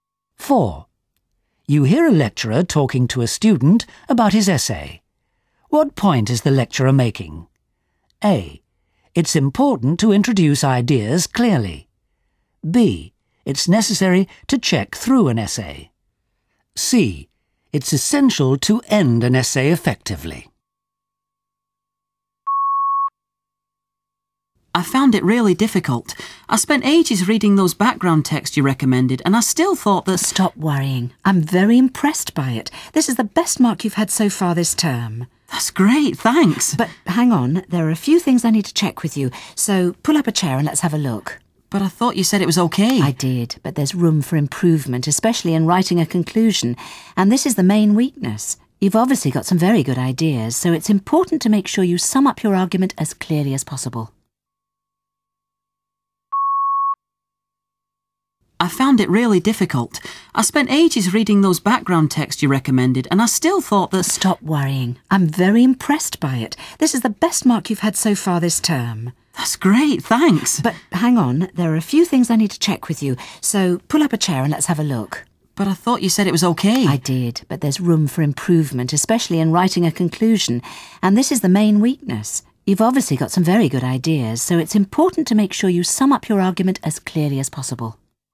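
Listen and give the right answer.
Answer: C: It's essential to end an essay effectively.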